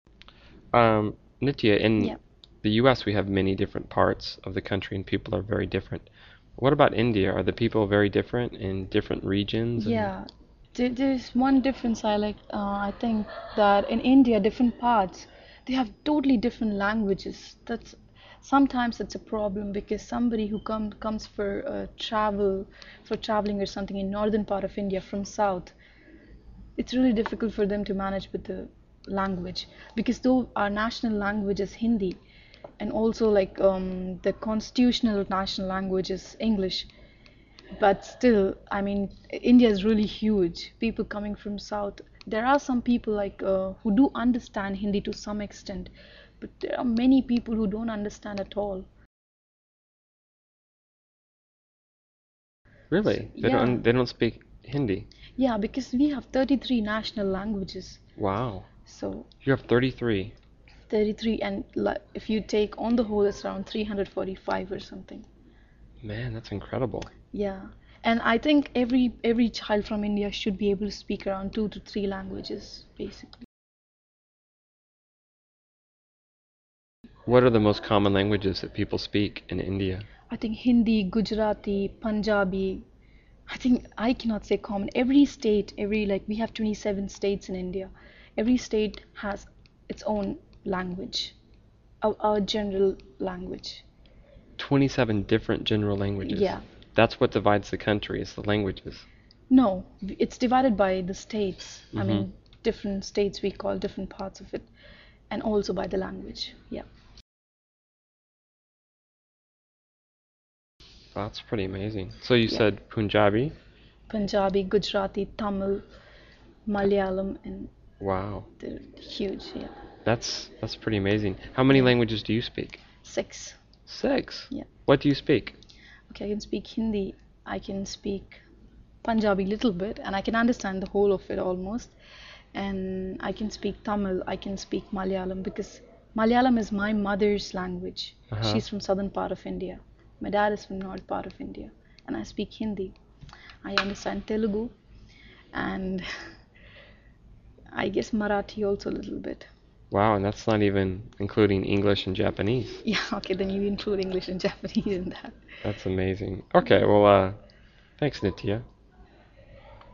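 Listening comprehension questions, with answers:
用 1-2 句话用自己的话回答下面的问题。点「✨ AI 判断」后,AI 会对照当天 transcript 给出参考要点与评分。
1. How many national languages does Nitya say India has, and what larger number does she mention for the total number of languages in the country?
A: 33 national languages; around 345 in total

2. According to Nitya, why is it sometimes a problem for someone traveling from the south to the north of India?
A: Different parts have totally different languages, and many people from the south don't understand Hindi at all

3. How many states are there in India, according to Nitya, and what does each state have?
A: 27 states; each has its own general language

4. List the languages Nitya says she can speak or understand, and mention which one is her mother's language.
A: Hindi, Punjabi, Tamil, Malayalam, Telugu, a little Marathi (plus English and Japanese); Malayalam is her mother's language

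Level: CEFRB1-B2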